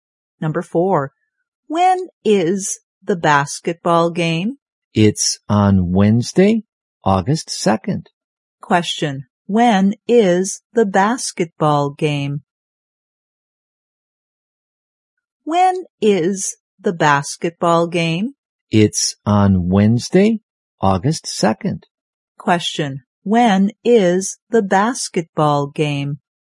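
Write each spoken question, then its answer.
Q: when is the basketball game?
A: On Wednesday, August 2nd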